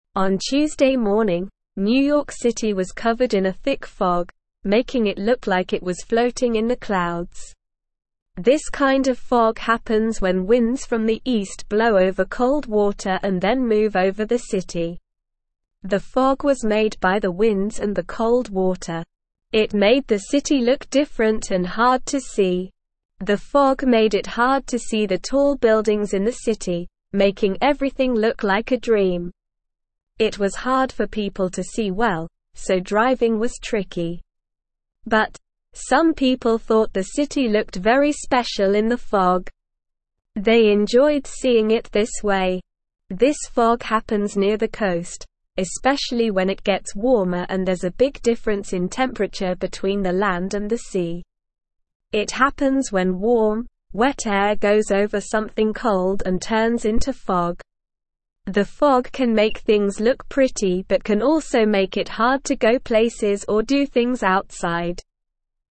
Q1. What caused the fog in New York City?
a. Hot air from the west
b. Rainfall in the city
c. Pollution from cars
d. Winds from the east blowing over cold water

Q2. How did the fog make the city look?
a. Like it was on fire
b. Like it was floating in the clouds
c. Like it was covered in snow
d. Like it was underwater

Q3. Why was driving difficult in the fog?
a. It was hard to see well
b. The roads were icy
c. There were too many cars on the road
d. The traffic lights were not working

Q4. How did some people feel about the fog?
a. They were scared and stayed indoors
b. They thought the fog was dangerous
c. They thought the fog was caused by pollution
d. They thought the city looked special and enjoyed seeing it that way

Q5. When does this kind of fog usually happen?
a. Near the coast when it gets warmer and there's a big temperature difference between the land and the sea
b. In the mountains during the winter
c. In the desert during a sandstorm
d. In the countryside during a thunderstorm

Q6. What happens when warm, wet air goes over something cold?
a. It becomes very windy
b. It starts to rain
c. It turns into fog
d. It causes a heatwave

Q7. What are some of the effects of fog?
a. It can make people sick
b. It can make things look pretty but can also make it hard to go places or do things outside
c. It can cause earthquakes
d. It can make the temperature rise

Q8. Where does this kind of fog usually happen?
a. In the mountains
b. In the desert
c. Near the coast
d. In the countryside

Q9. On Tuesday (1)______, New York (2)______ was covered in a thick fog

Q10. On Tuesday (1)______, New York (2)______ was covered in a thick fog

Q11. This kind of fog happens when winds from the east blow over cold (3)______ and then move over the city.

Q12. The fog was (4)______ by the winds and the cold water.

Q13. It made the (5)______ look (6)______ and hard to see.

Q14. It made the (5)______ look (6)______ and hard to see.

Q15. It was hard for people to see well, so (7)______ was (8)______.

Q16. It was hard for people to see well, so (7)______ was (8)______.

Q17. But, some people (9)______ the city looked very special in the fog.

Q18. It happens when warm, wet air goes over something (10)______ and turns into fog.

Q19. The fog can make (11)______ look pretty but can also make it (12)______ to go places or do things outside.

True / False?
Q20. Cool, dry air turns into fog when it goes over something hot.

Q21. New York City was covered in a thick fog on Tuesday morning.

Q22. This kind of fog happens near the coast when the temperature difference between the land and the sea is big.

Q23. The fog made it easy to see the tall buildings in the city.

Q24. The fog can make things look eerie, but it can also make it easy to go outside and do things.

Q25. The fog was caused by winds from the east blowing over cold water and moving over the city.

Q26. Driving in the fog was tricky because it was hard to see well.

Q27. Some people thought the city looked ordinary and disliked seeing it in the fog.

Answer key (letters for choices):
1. d
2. b
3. a
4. d
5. a
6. c
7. b
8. c
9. morning
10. City
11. water
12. made
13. city
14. different
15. driving
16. tricky
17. thought
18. cold
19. hard
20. False
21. True
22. True
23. False
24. False
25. True
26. True
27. False

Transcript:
On Tuesday morning, New York City was covered in a thick fog, making it look like it was floating in the clouds. This kind of fog happens when winds from the east blow over cold water and then move over the city. The fog was made by the winds and the cold water. It made the city look different and hard to see.
The fog made it hard to see the tall buildings in the city, making everything look like a dream. It was hard for people to see well, so driving was tricky. But, some people thought the city looked very special in the fog. They enjoyed seeing it this way.
This fog happens near the coast, especially when it gets warmer and there's a big difference in temperature between the land and the sea. It happens when warm, wet air goes over something cold and turns into fog. The fog can make things look pretty but can also make it hard to go places or do things outside.

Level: Level 2